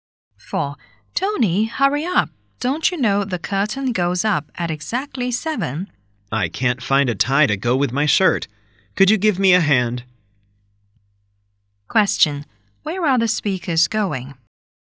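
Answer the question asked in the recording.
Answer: To the theater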